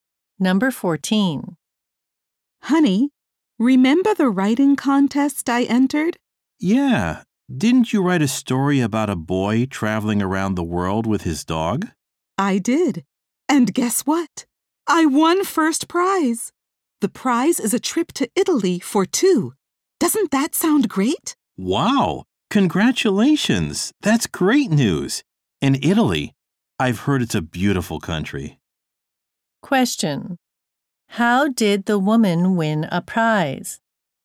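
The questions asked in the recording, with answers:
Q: How did the woman win a prize?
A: By writing a story for a contest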